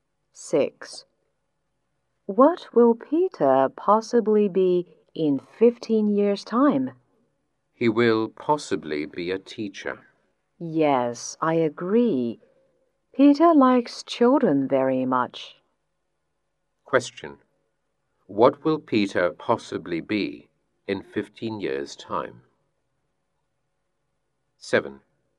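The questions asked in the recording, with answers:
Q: What will Peter possibly be in 15 years' time?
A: A teacher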